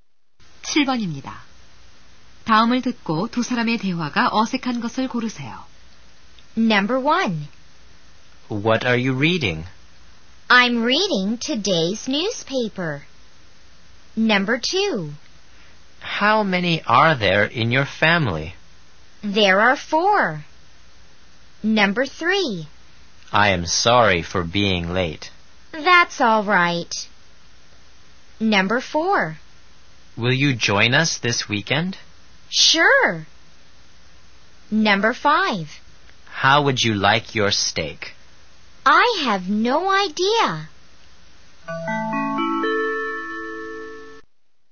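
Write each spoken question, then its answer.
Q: 다음을 듣고 두 사람의 대화가 어색한 것을 고르세요.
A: 5번: How would you like your steak? - I have no idea.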